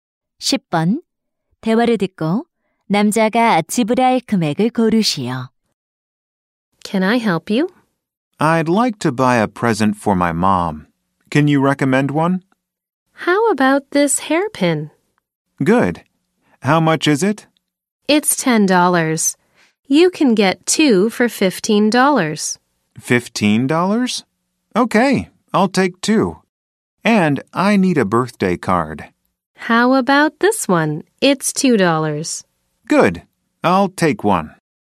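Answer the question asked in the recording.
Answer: $17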